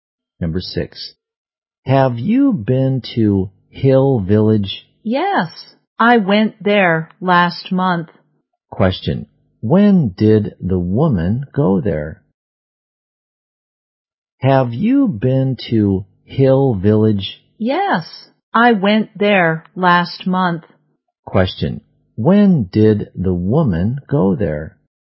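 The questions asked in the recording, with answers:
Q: when did the woman go there?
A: Last month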